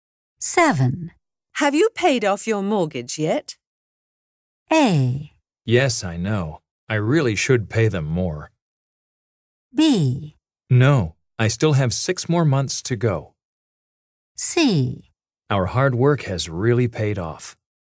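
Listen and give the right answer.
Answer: B: No, I still have 6 more months to go.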